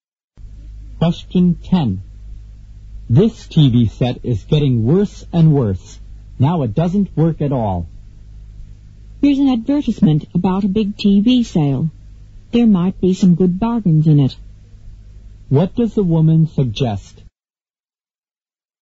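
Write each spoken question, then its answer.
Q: What does the woman suggest?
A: Buying a new TV set at the sale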